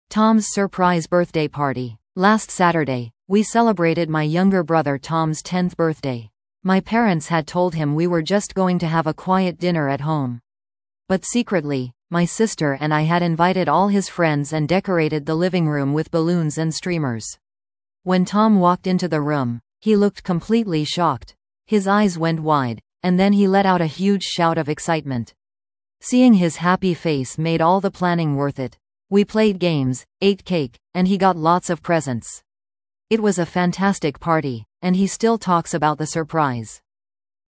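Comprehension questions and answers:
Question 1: Whose birthday was it?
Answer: Tom's (the speaker's younger brother)

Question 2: What did Tom expect for his birthday celebration?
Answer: A quiet dinner at home

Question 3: How did Tom react when he saw the surprise party?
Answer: He looked completely shocked, then shouted with excitement

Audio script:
Tom's Surprise Birthday Party
Last Saturday, we celebrated my younger brother Tom's tenth birthday. My parents had told him we were just going to have a quiet dinner at home. But secretly, my sister and I had invited all his friends and decorated the living room with balloons and streamers. When Tom walked into the room, he looked completely shocked! His eyes went wide, and then he let out a huge shout of excitement. Seeing his happy face made all the planning worth it. We played games, ate cake, and he got lots of presents. It was a fantastic party, and he still talks about the surprise.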